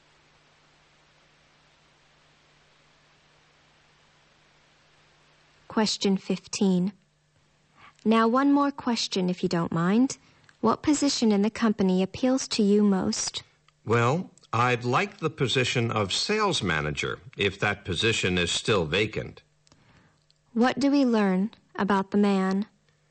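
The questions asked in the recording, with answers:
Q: What do we learn about the man?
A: He is applying for the position of sales manager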